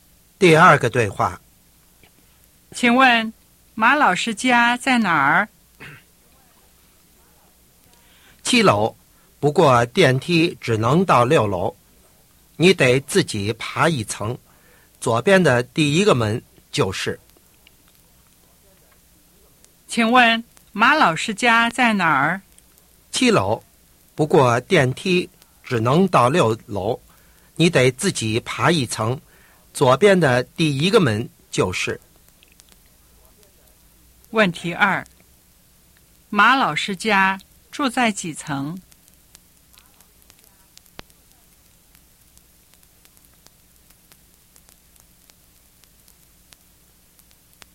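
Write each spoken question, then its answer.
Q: 马老师家住在几层?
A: 七楼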